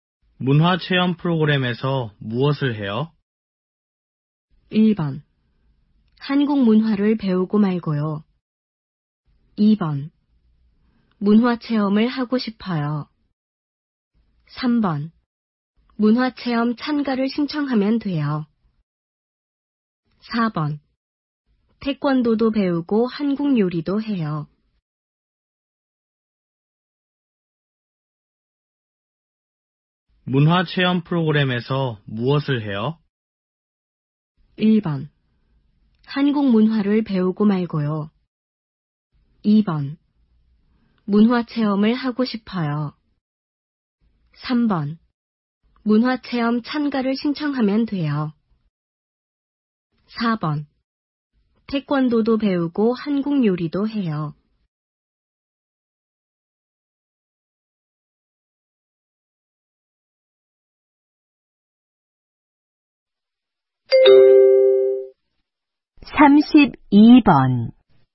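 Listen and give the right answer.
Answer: 4: 태권도도 배우고 한국 요리도 해요.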